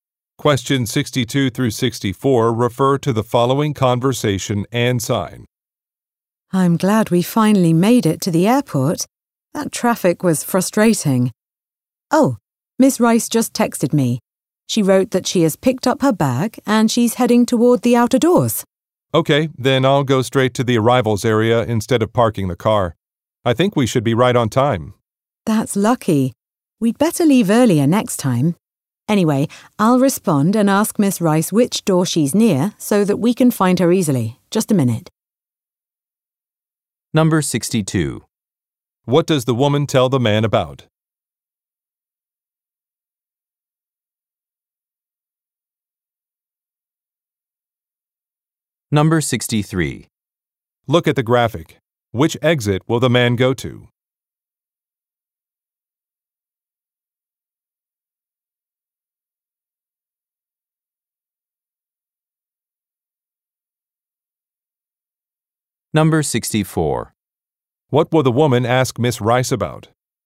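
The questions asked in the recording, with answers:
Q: What does the woman tell the man about?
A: A text from Miss Rice saying she has her bag and is heading to the outer doors

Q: What will the woman ask Miss Rice about?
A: Which door she is near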